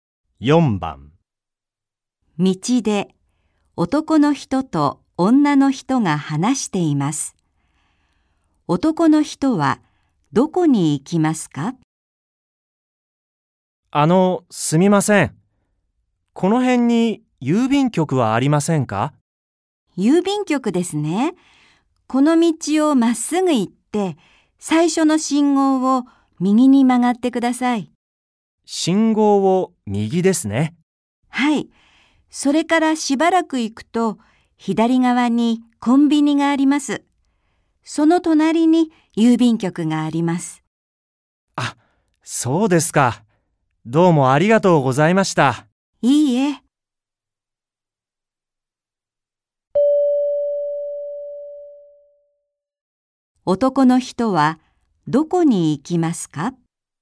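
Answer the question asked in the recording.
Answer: 郵便局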